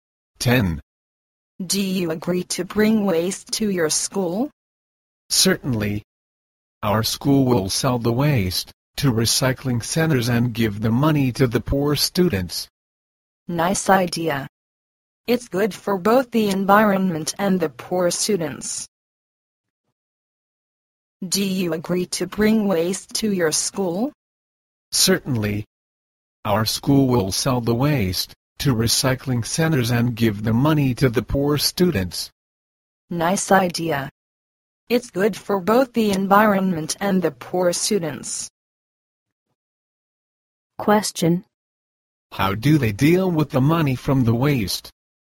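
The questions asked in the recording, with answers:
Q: How do they deal with the money from the waste?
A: They give it to the poor students.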